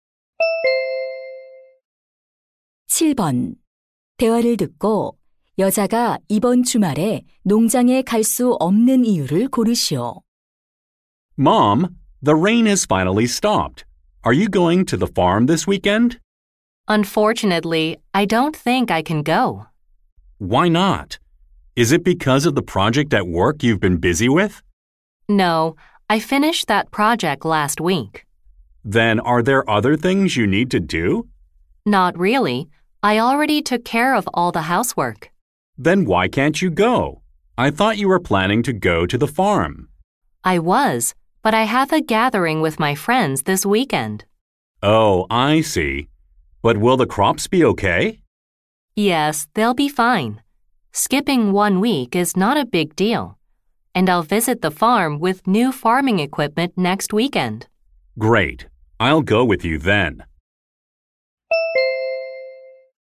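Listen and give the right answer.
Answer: 친구들과의 모임이 있어서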